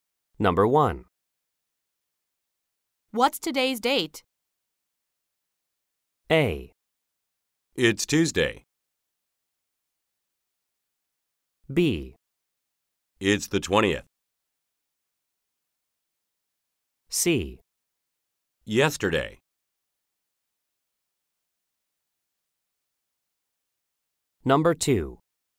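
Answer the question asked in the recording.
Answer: B: It's the 20th.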